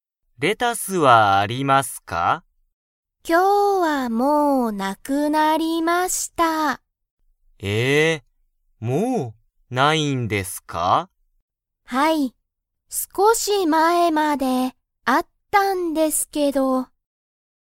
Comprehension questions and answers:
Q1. 今日(きょう)、レタスはありますか?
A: いいえ